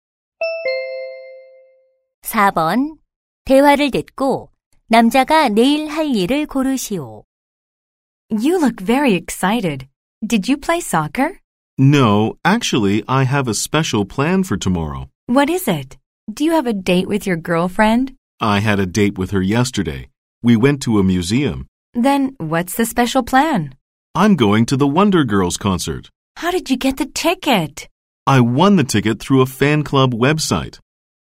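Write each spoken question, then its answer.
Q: 대화를 듣고 남자가 내일 할 일을 고르시오.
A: 원더걸스 콘서트에 가기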